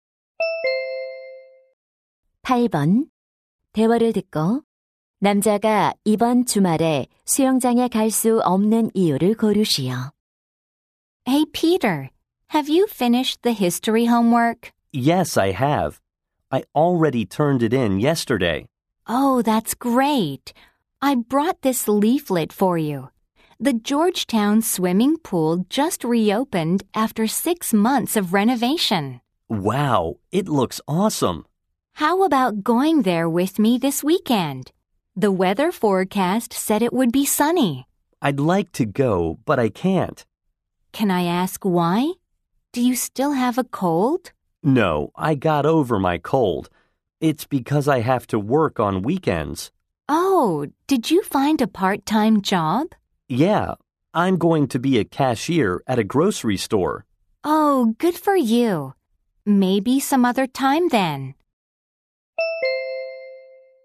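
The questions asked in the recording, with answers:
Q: 대화를 듣고 남자가 이번 주말에 수영장에 갈 수 없는 이유를 고르시오.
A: 주말에 아르바이트를 해야 해서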